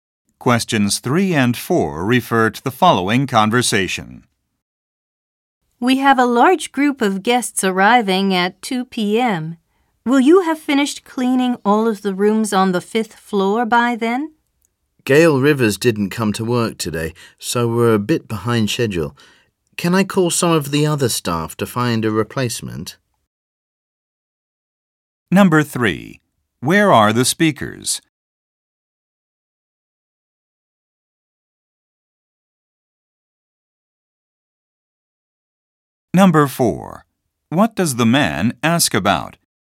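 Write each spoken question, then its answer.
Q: Where are the speakers?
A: At a hotel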